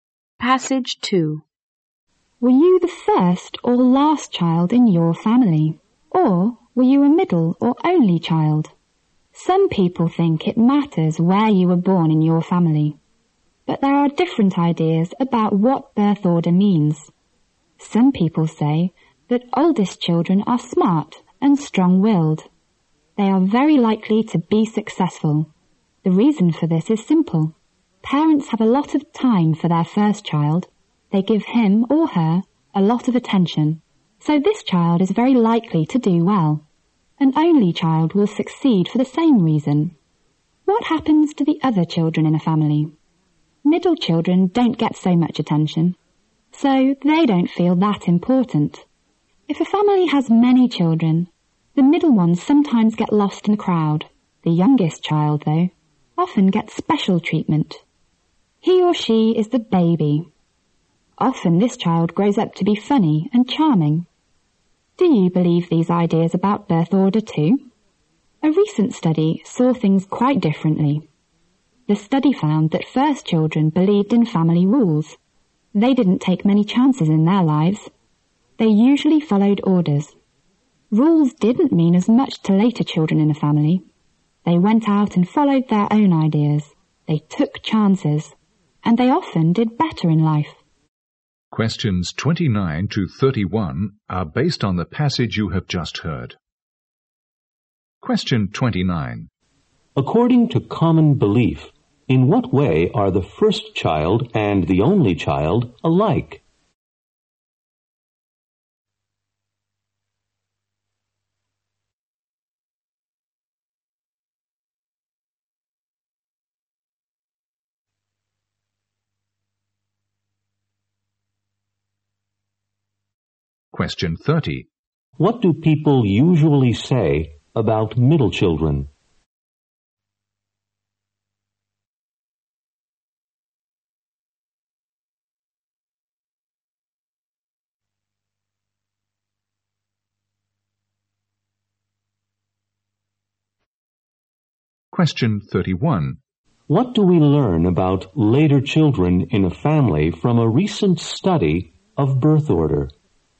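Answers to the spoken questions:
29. They get a lot of attention and are likely to succeed
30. They don't get much attention and don't feel important
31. They take chances, follow their own ideas and often do better in life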